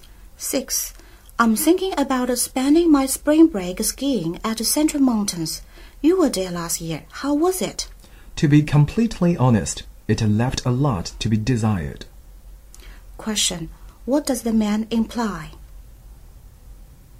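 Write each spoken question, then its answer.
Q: What does the man imply?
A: The ski trip was disappointing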